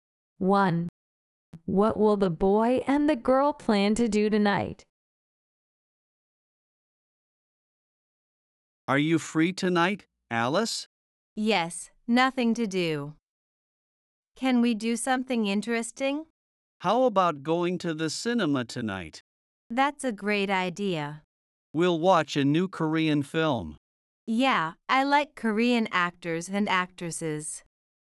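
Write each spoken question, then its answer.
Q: What will the boy and the girl plan to do tonight?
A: Go to the cinema to watch a new Korean film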